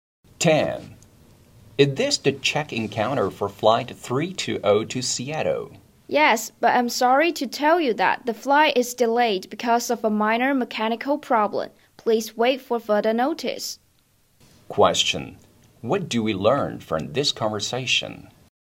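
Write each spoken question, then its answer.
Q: What do we learn from this conversation?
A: The flight is delayed by a mechanical problem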